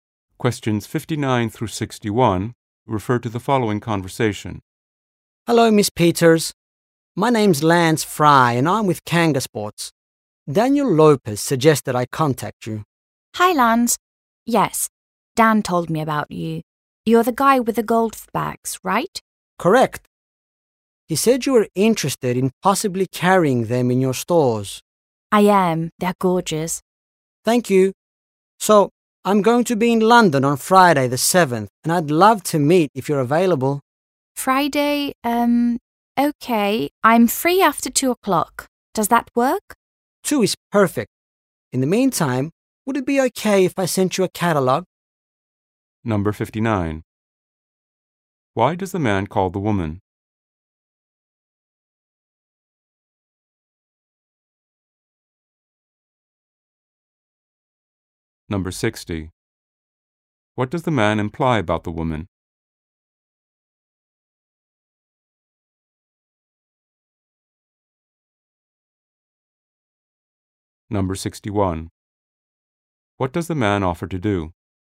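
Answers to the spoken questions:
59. To arrange a meeting about his golf bags
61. Send a catalogue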